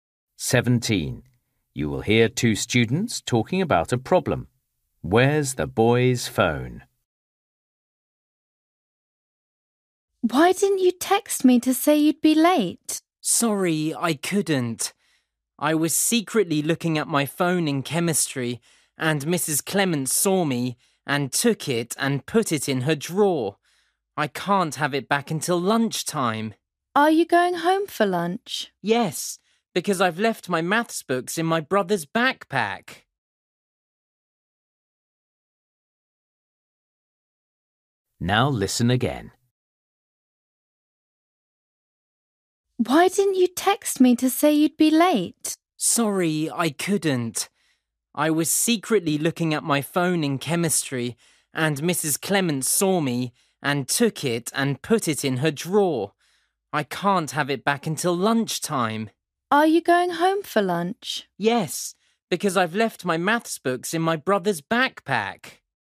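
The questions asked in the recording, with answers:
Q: Where's the boy's phone?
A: In Mrs Clements' drawer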